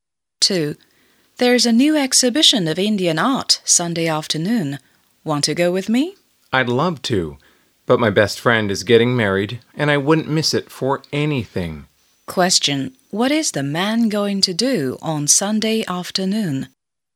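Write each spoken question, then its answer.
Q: What is the man going to do on Sunday afternoon?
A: Go to his best friend's wedding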